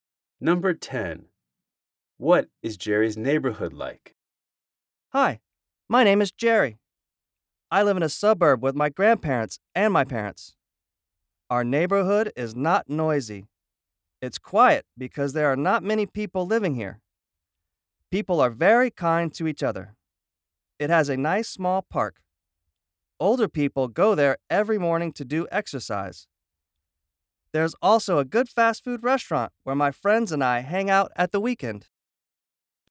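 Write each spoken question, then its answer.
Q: What is Jerry's neighborhood like?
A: Quiet, with kind people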